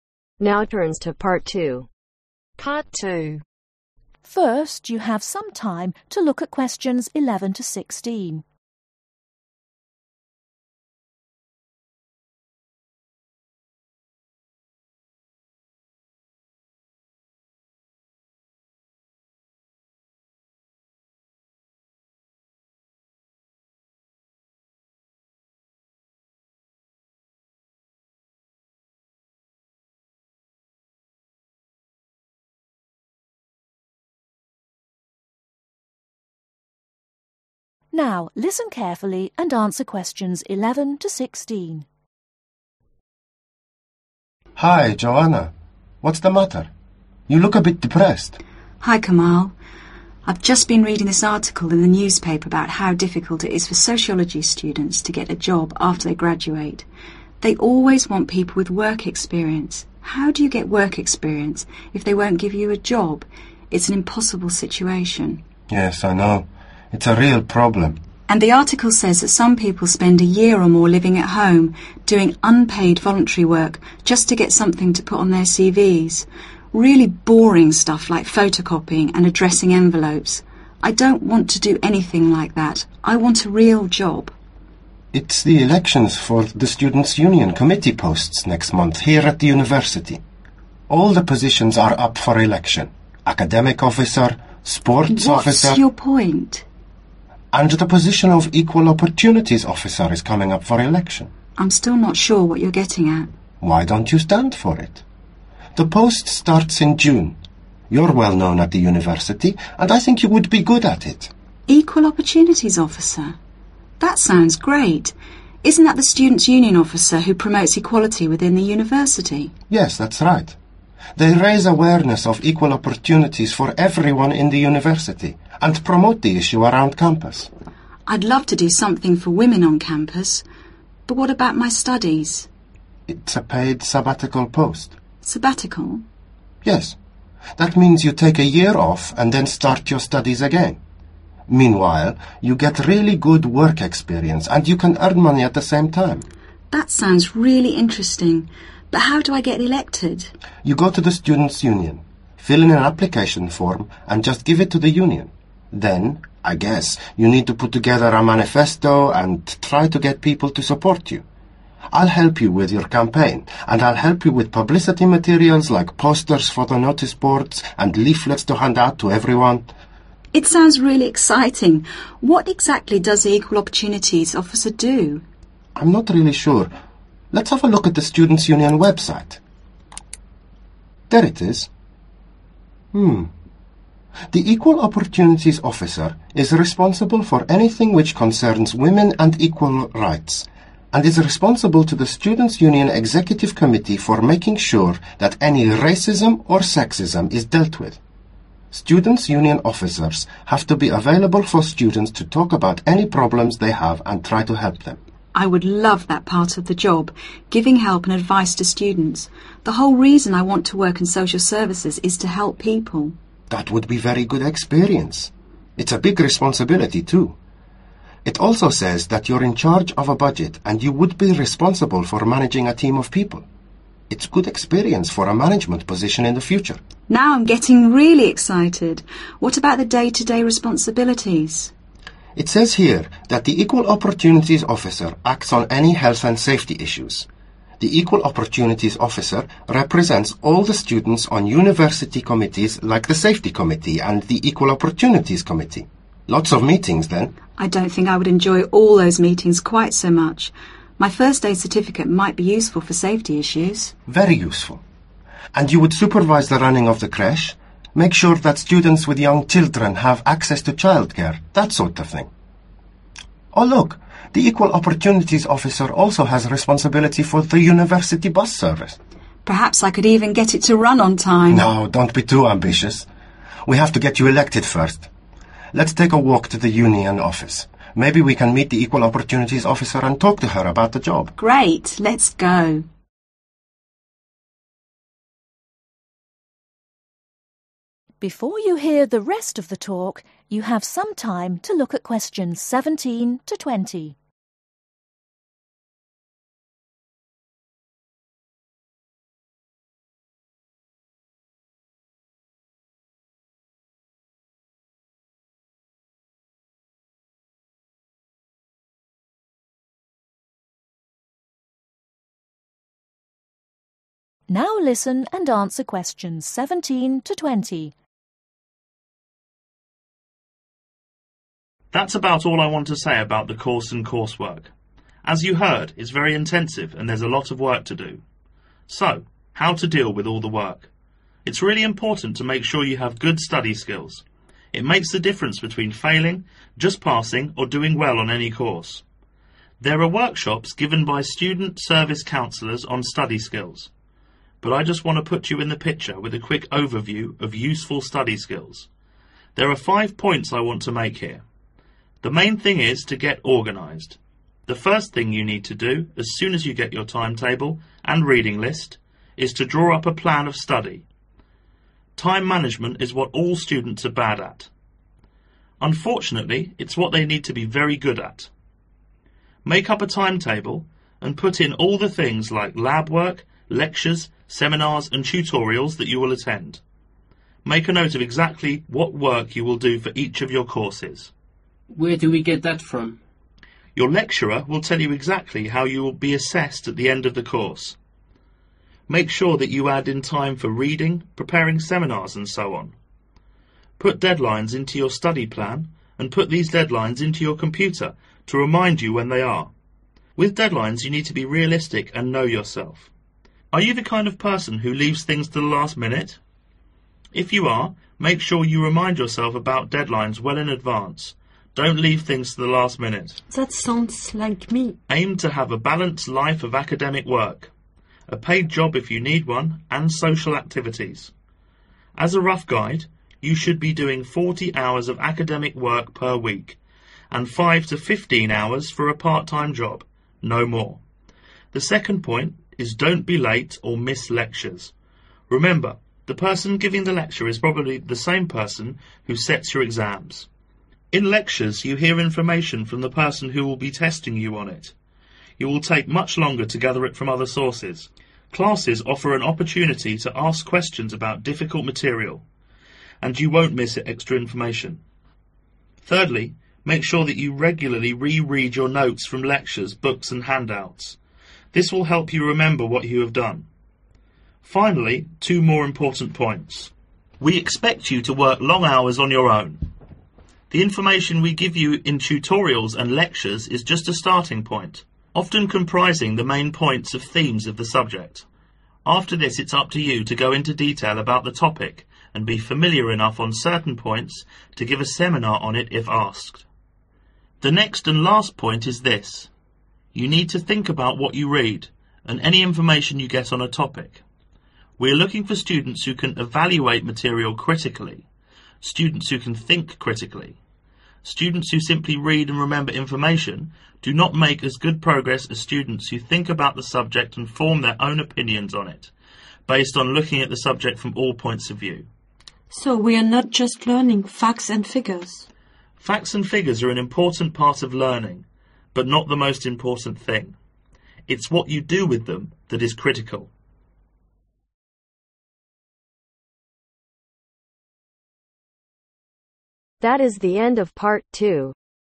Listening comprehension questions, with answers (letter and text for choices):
Circle the correct letter A-C.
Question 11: Joanna is a student of ............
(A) sociology.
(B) chemistry.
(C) medicine.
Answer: (A) sociology.

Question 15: Joanna's friend offers to help her with ............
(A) starting a website.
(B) finding a job.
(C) publicity.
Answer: (C) publicity.

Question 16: One part of the job Joanna will not enjoy is ............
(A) meetings.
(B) running the bus service.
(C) day-to day responsibilities.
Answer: (A) meetings.

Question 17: Students need to be good at ............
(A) time management.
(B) laboratory work.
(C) listening.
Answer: (A) time management.

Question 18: With deadlines , students need to ............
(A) put them in a calendar or a diary.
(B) leave things to the last minute.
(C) be realistic.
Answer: (C) be realistic.

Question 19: It is important to attend lectures as ............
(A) the lecture will test the students.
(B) students get extra materials in lectures.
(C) students can remember information more easily.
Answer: (A) the lecture will test the students.

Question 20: Critical thinking is ............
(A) remembering facts and figures.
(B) part of the course.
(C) reading information and forming an opinion about it.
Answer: (C) reading information and forming an opinion about it.